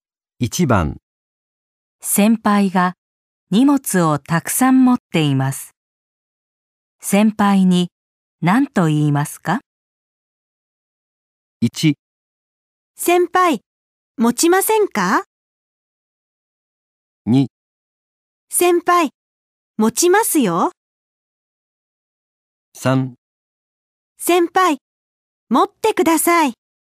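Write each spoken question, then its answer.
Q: 先輩が荷物をたくさん持っています。先輩に何と言いますか?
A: 2: 先輩持ちますよ。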